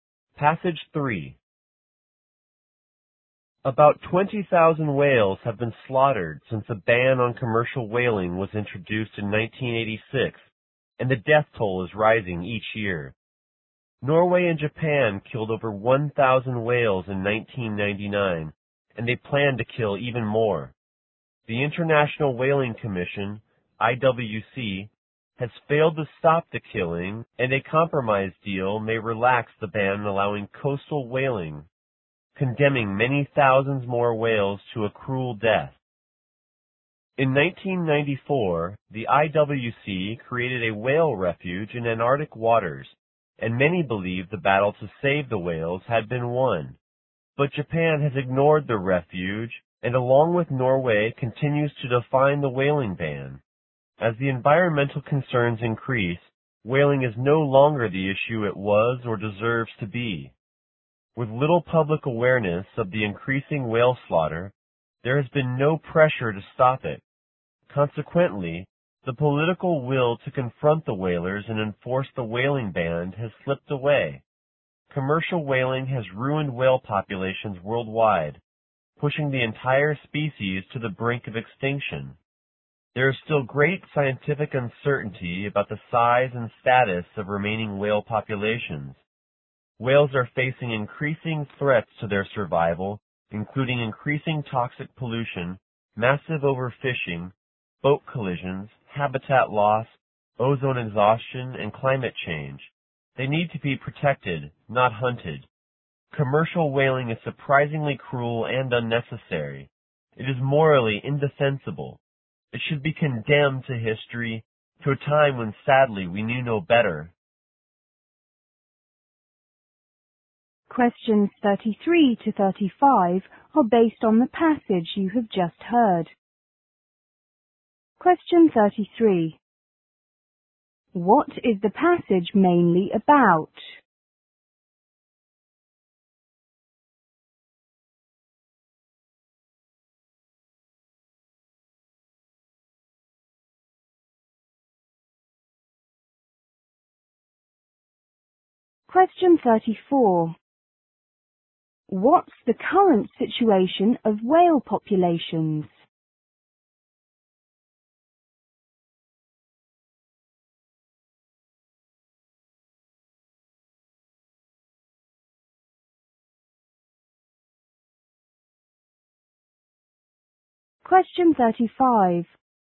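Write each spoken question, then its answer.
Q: What is the passage mainly about?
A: Whaling goes on despite the ban, and whales need to be protected.

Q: What's the current situation of whale populations?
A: They are near extinction, and their size and status are uncertain.

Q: What is the author's overall viewpoint at the end of the speech?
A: Commercial whaling is cruel and should be stopped for good.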